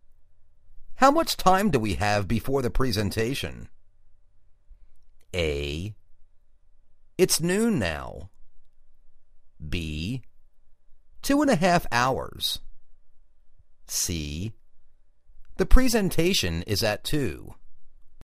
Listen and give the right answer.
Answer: Two-and-a-half hours